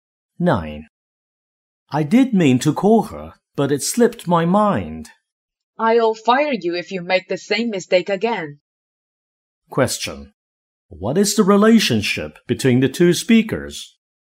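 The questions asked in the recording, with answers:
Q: What is the relationship between the two speakers?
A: Employer and employee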